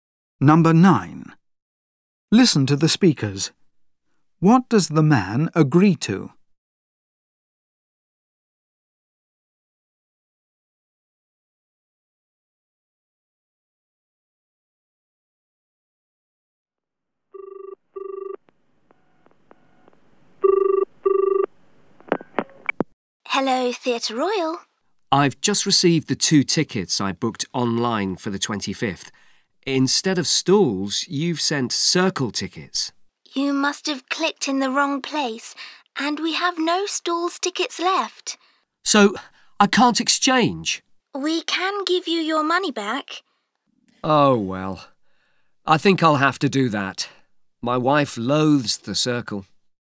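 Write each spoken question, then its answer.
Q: What does the man agree to?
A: Getting his money back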